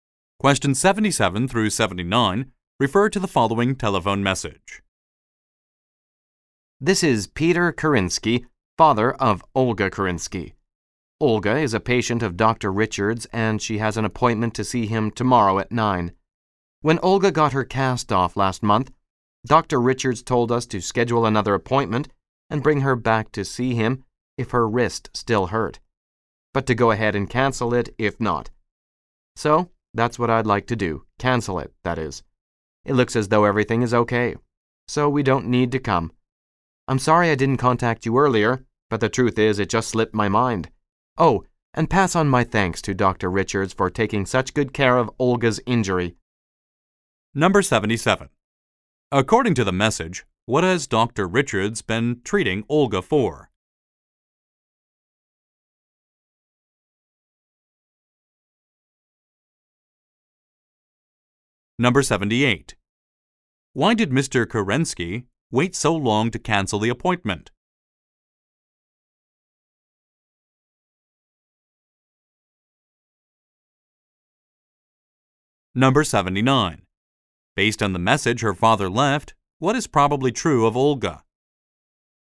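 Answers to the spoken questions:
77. An injured wrist
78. He forgot
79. Her wrist has healed and no longer hurts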